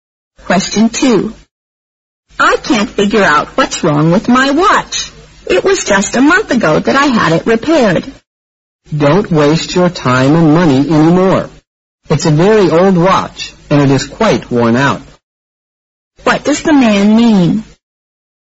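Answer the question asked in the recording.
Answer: The watch isn't worth repairing again; she should get a new one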